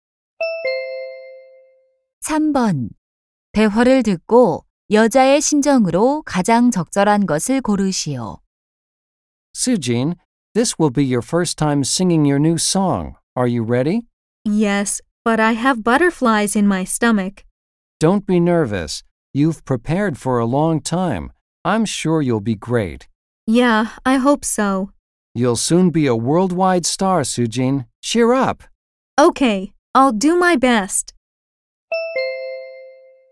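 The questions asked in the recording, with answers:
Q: 대화를 듣고 여자의 심정으로 가장 적절한 것을 고르시오.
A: 긴장됨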